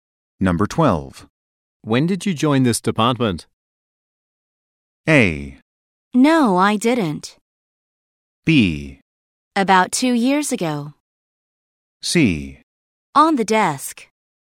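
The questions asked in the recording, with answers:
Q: When did you join this department?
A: B: About 2 years ago.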